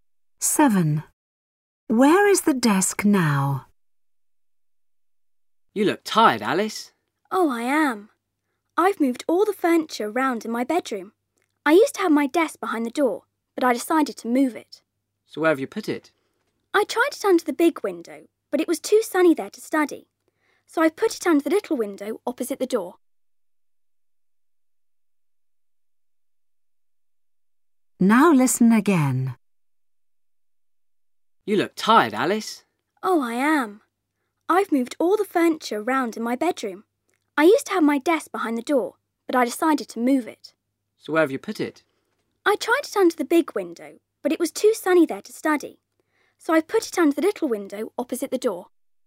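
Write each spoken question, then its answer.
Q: Where is the desk now?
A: Under the little window opposite the door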